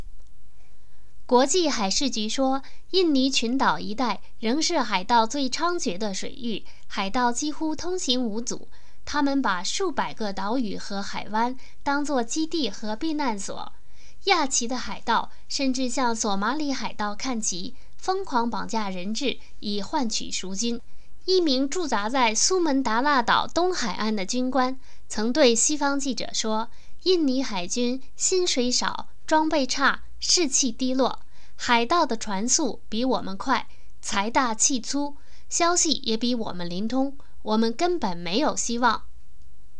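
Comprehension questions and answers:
Please answer the following questions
为什么印尼海军不是海盗的对手?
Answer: 印尼海军薪水少,装备差,士气低落;海盗船速更快,财大气粗,消息更灵通。

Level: 3rd Year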